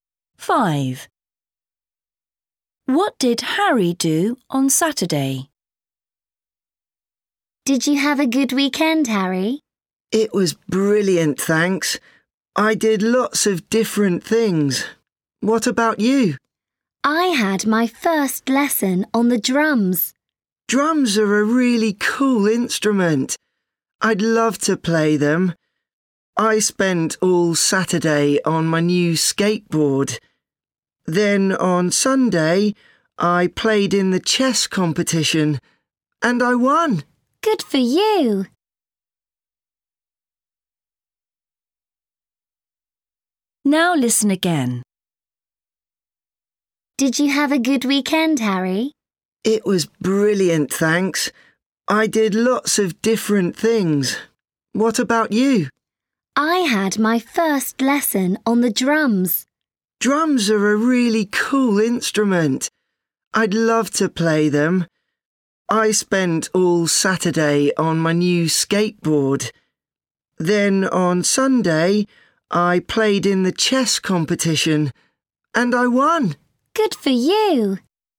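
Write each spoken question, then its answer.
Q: What did Harry do on Saturday?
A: He rode his new skateboard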